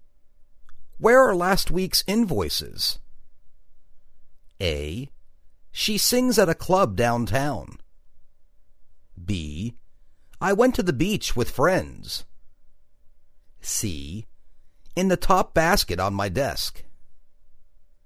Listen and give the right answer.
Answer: In the top basket on my desk.